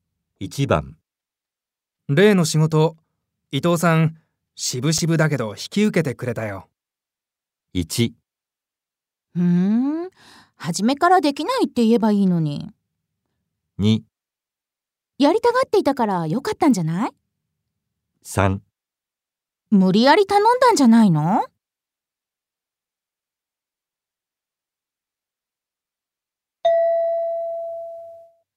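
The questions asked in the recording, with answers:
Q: 例の仕事、伊藤さん、渋々だけど引き受けてくれたよ。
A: 3: 無理やり頼んだんじゃないの?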